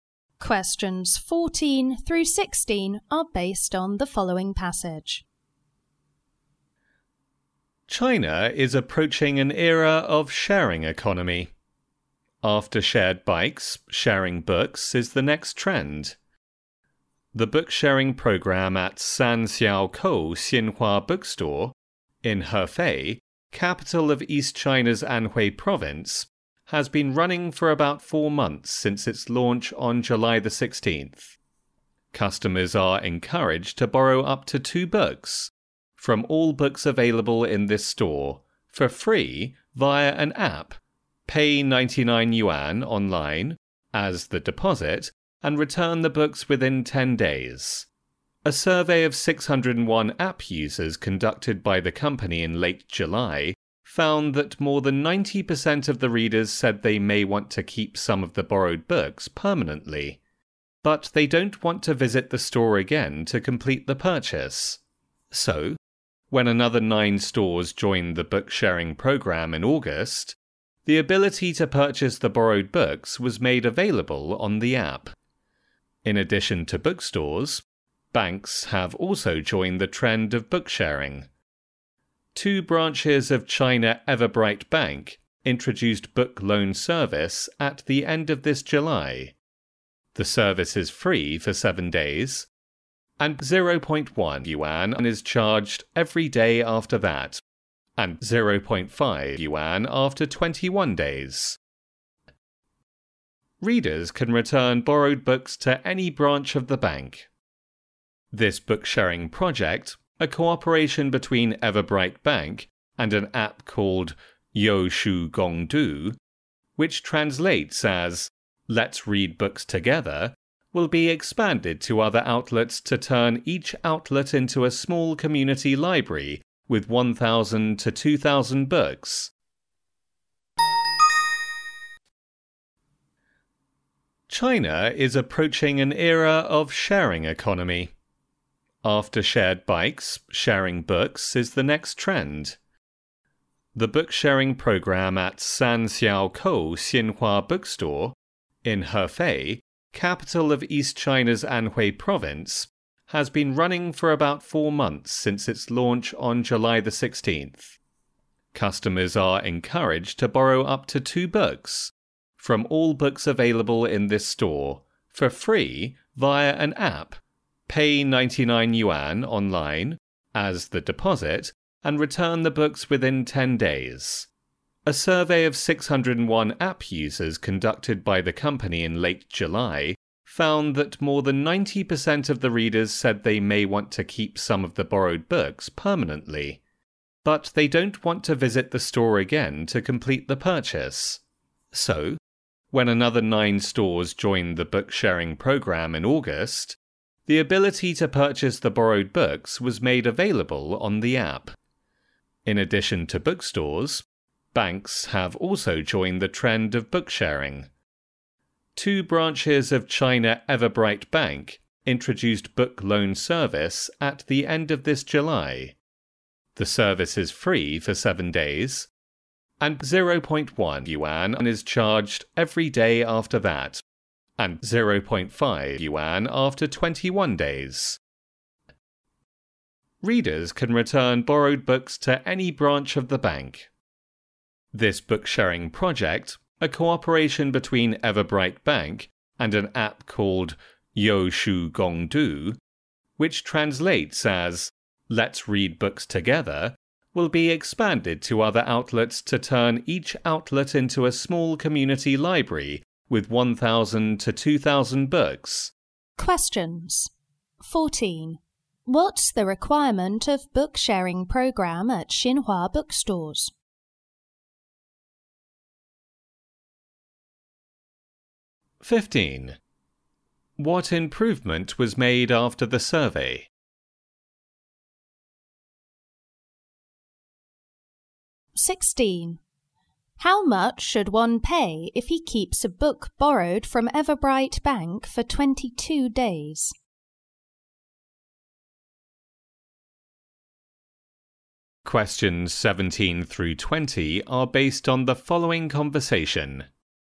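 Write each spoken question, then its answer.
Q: What's the requirement of book sharing program at Xinhua bookstores?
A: Pay a 99-yuan deposit online and return the books within 10 days

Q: What improvement was made after the survey?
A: Borrowed books could be bought through the app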